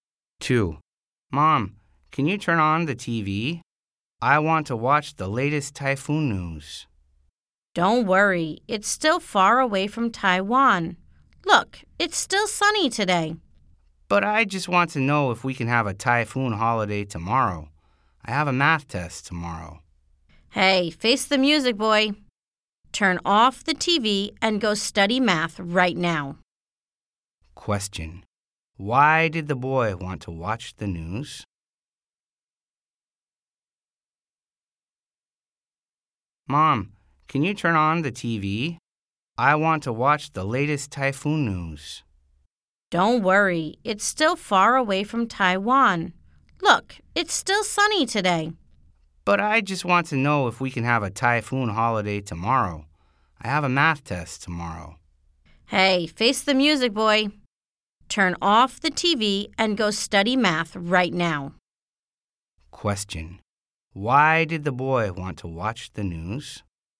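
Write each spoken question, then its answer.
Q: Why did the boy want to watch the news?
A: He hoped for a typhoon holiday so he could miss tomorrow's math test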